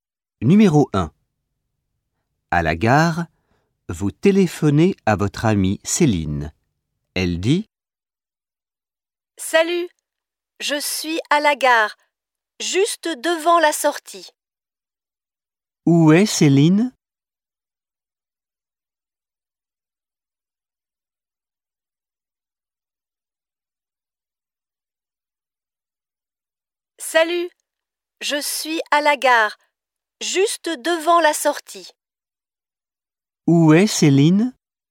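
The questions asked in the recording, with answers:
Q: Où est Céline ?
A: À la gare, juste devant la sortie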